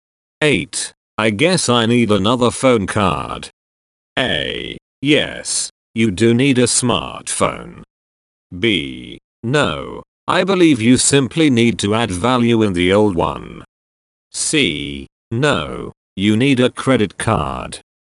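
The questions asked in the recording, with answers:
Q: I guess I need another phone card.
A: B: No, I believe you simply need to add value in the old one.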